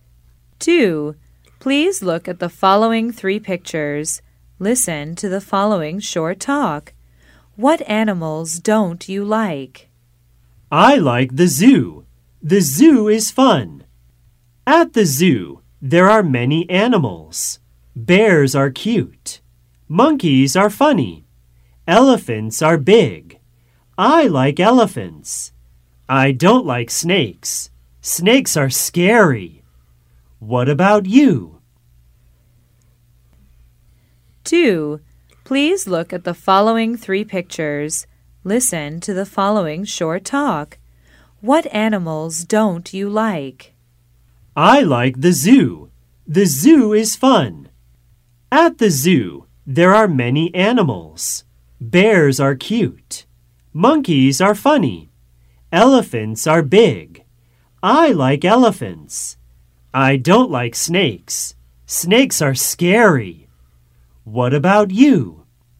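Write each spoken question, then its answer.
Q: What animals don't you like?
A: Snakes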